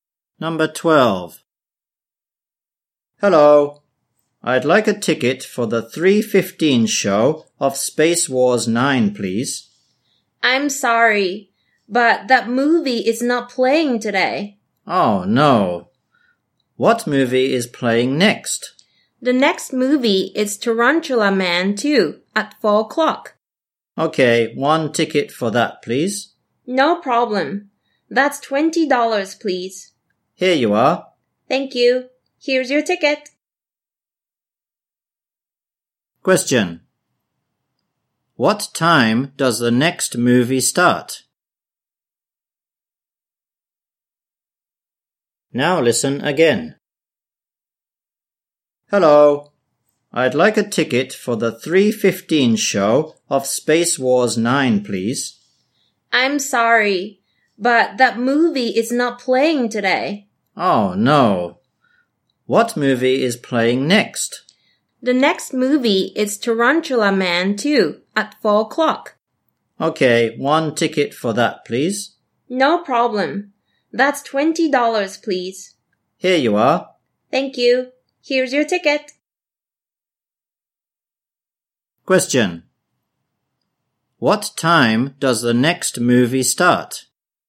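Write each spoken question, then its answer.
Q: What time does the next movie start?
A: At 4 o'clock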